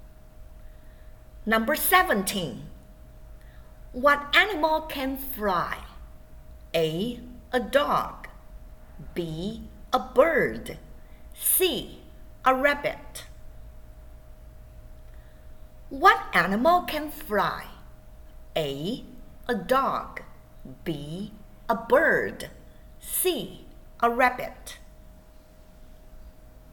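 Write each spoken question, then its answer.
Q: What animal can fly?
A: B: A bird.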